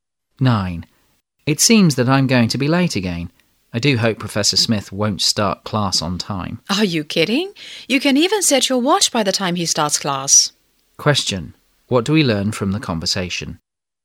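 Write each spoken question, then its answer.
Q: What do we learn from the conversation?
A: Professor Smith always starts class on time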